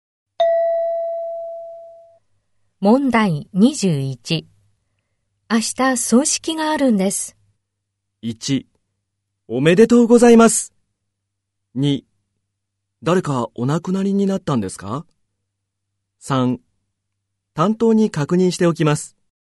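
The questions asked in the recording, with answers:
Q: 明日葬式があるんです。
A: 2: 誰かお亡くなりになったんですか?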